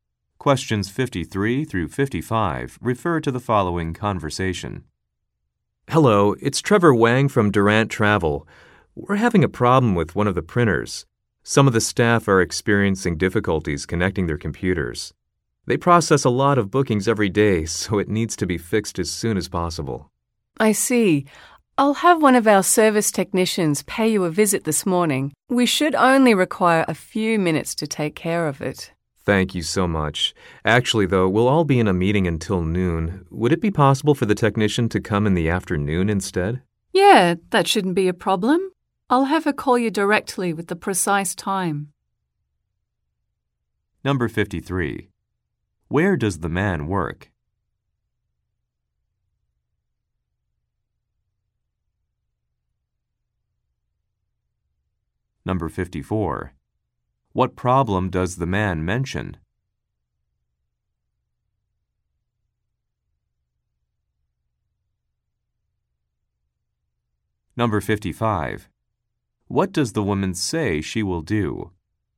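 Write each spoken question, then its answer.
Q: Where does the man work?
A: At a travel agency (Durant Travel)

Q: What problem does the man mention?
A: Staff can't connect their computers to a printer

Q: What does the woman say she will do?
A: Have the technician call him with the exact time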